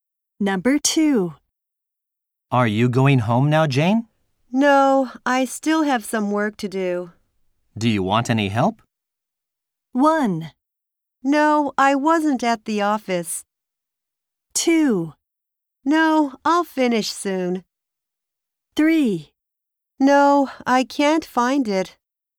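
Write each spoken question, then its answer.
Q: Do you want any help?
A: 2: No, I'll finish soon.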